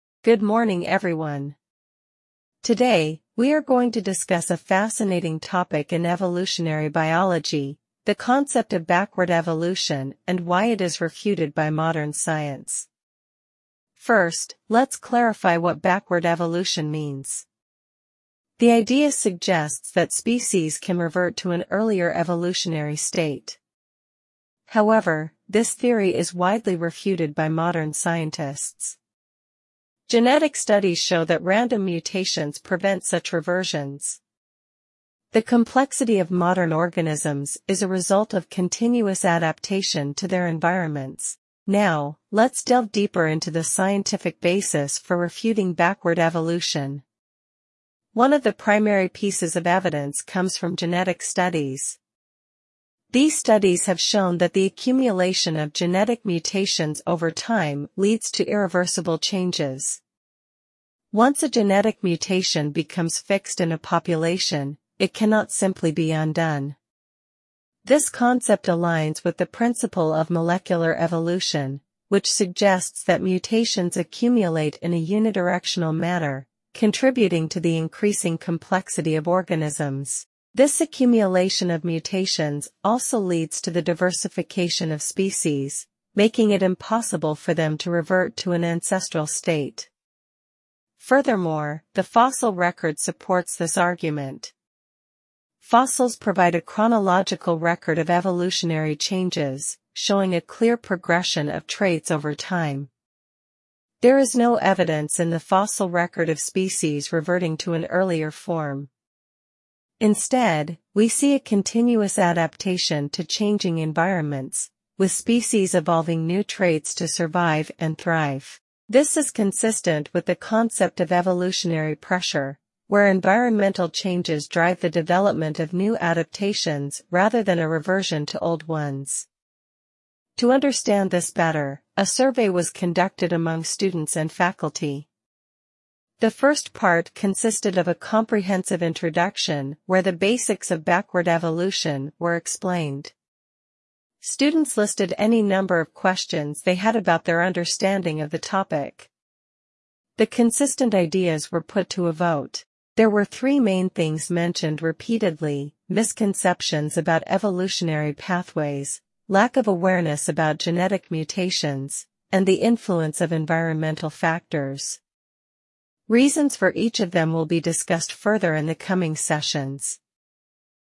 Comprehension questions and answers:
Complete the notes below. Write ONE WORD ONLY for each answer.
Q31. This theory is widely (31)______by modern scientists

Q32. Genetic studies show that (32)______mutations prevent such reversions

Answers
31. refuted
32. random

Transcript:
Good morning everyone. Today, we are going to discuss a fascinating topic in evolutionary biology - the concept of backward evolution and why it is refuted by modern science.
First, let's clarify what backward evolution means. The idea suggests that species can revert to an earlier evolutionary state. However, this theory is widely refuted by modern scientists. Genetic studies show that random mutations prevent such reversions. The complexity of modern organisms is a result of continuous adaptation to their environments.
Now, let's delve deeper into the scientific basis for refuting backward evolution. One of the primary pieces of evidence comes from genetic studies. These studies have shown that the accumulation of genetic mutations over time leads to irreversible changes. Once a genetic mutation becomes fixed in a population, it cannot simply be undone. This concept aligns with the principle of molecular evolution, which suggests that mutations accumulate in a unidirectional manner, contributing to the increasing complexity of organisms.
Furthermore, the fossil record supports this argument. Fossils provide a chronological record of evolutionary changes, showing a clear progression of traits over time. There is no evidence in the fossil record of species reverting to an earlier form. Instead, we see a continuous adaptation to changing environments, with species evolving new traits to survive and thrive. This is consistent with the concept of evolutionary pressure, where environmental changes drive the development of new adaptations rather than a reversion to old ones.
To understand this better, a survey was conducted among students and faculty. The first part consisted of a comprehensive introduction where the basics of backward evolution were explained. Students listed any number of questions they had about their understanding of the topic. The consistent ideas were put to a vote. There were three main things mentioned repeatedly: misconceptions about evolutionary pathways, lack of awareness about genetic mutations, and the influence of environmental factors. Reasons for each of them will be discussed further in the coming sessions.